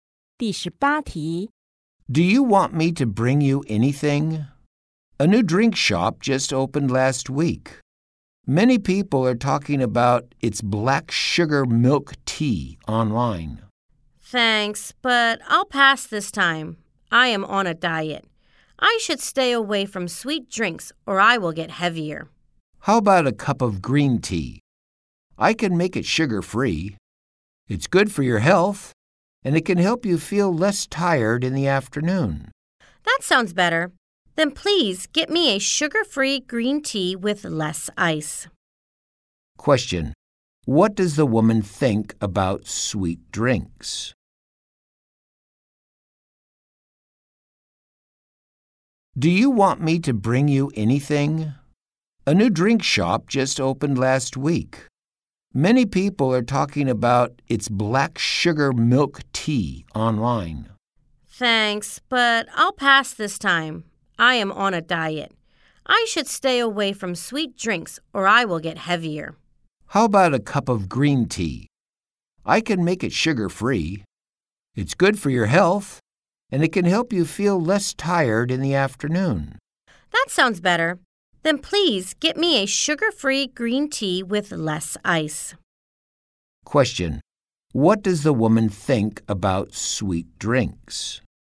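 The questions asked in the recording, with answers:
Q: What does the woman think about sweet drinks?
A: She should stay away from them because they will make her heavier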